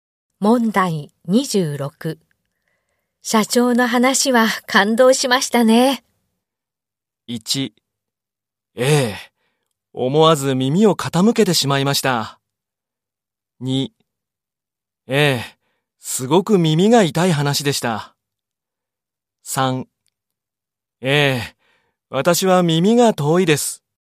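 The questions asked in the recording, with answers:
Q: 社長の話は感動しましたね。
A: 1: ええ、思わず耳を傾けてしまいました。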